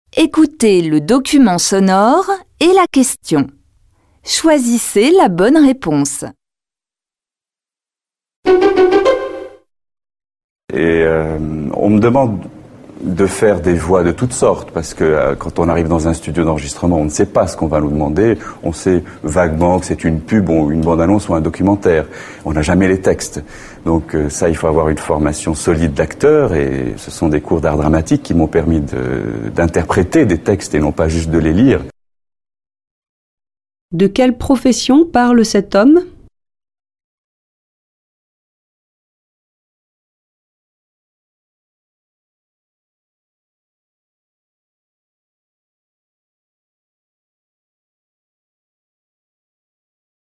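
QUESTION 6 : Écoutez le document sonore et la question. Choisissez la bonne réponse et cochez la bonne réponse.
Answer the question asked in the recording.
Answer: Comédien qui prête sa voix (publicités, bandes-annonces, documentaires).

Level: Tăng dần từ trình độ A1 đến C1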